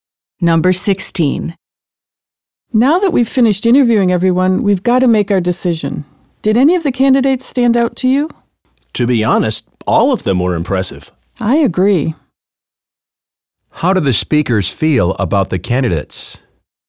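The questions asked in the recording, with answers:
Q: How do the speakers feel about the candidates?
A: All were impressive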